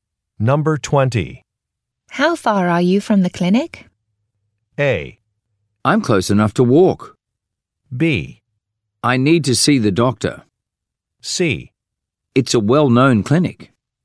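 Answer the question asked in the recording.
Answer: A: I'm close enough to walk.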